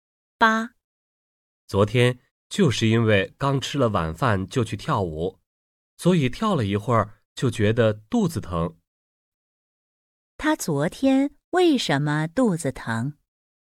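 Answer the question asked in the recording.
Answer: 刚吃了晚饭就去跳舞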